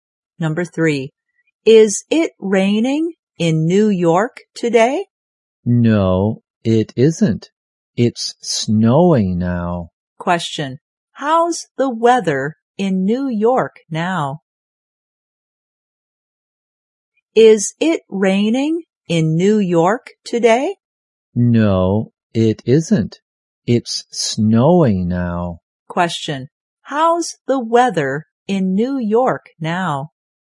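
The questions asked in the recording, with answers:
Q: Question, how's the weather in New York now?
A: It's snowing.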